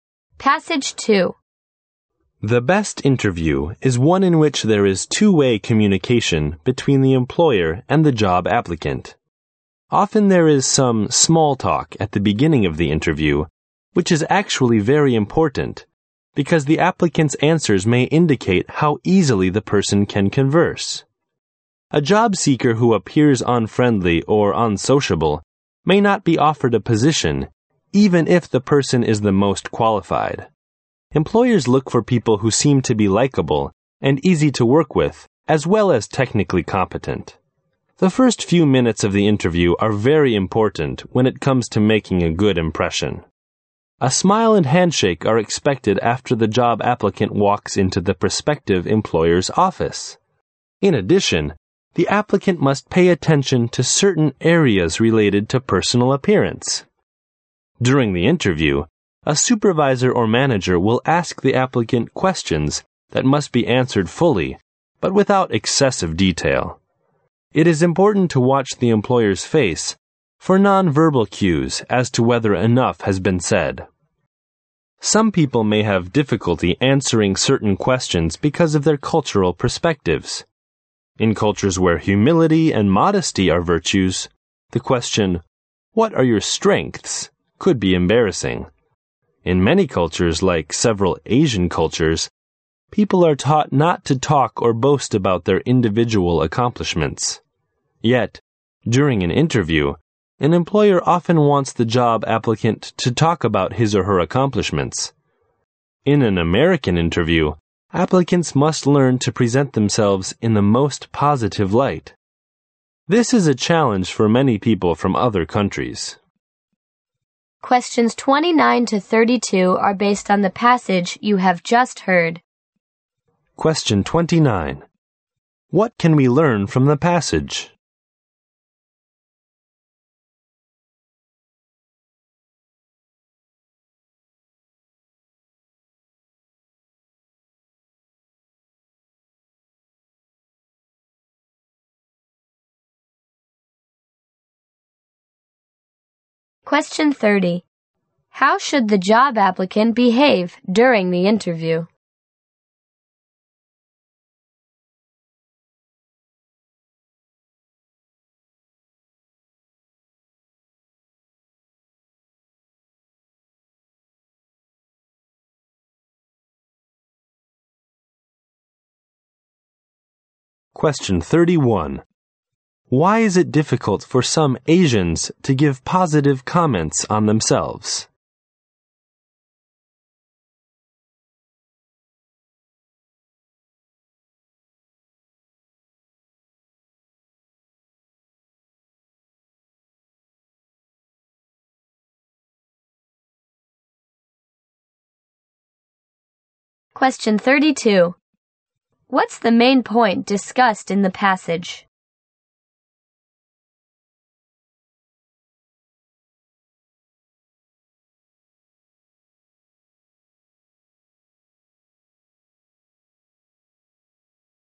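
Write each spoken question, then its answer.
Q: Why is it difficult for some Asians to give positive comments on themselves?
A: They are taught humility and not to boast about their accomplishments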